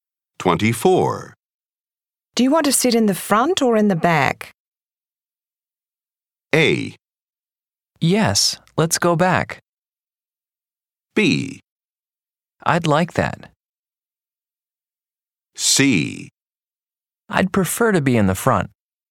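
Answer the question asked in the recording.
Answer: C: I'd prefer to be in the front.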